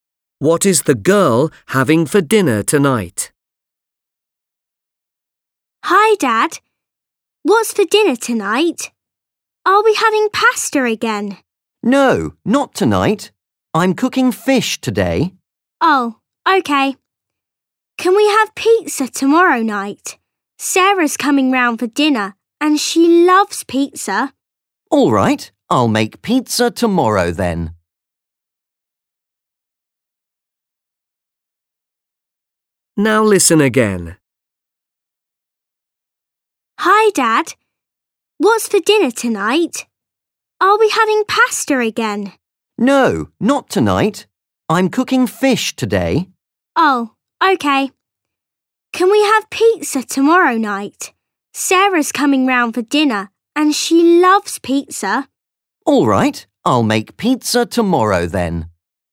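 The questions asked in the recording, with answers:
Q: What is the girl having for dinner tonight?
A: Fish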